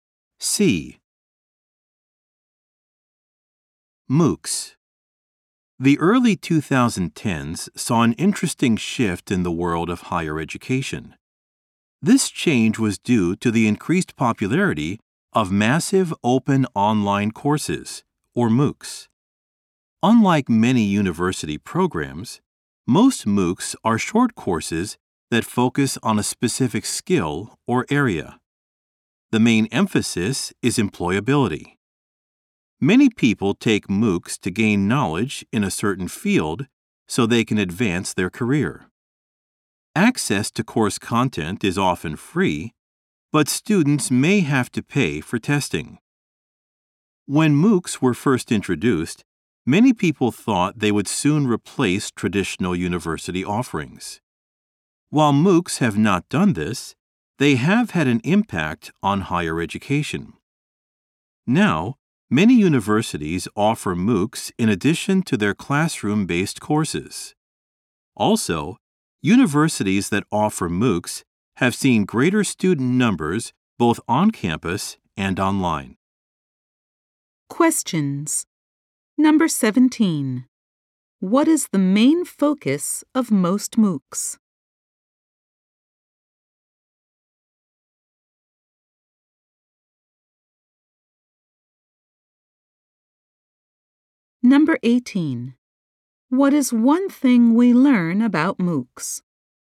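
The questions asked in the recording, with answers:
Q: What is the main focus of most MOOCs?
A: Employability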